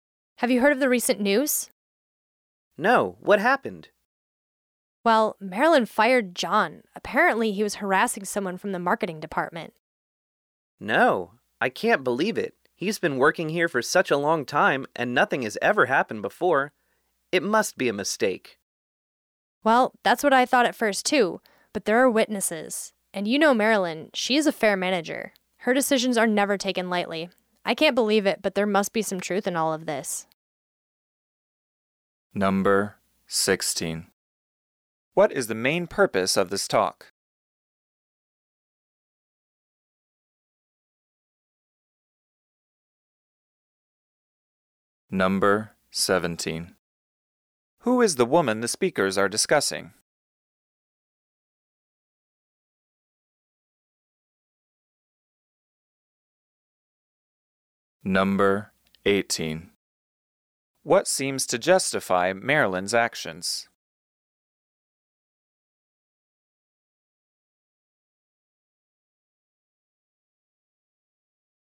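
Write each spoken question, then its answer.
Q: What is the main purpose of this talk?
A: To discuss the news that Marilyn fired John for harassment

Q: Who is the woman the speakers are discussing?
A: Marilyn, their manager

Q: What seems to justify Marilyn's actions?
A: There are witnesses (and she is a fair manager)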